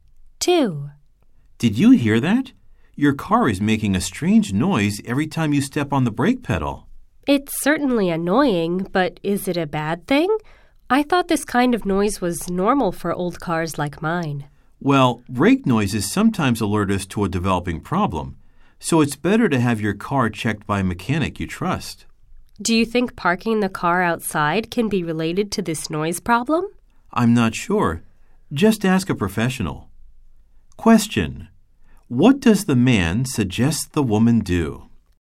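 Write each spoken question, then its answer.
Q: What does the man suggest the woman do?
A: Have her car checked by a mechanic she trusts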